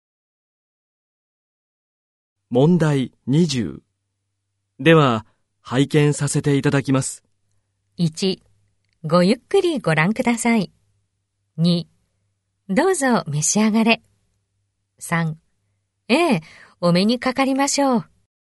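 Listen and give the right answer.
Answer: 1: ごゆっくりご覧ください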